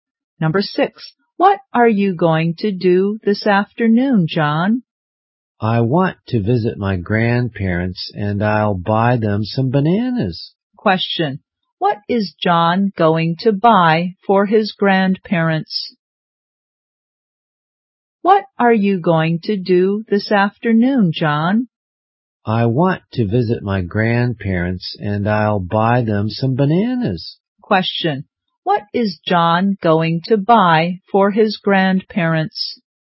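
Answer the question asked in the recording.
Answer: Some bananas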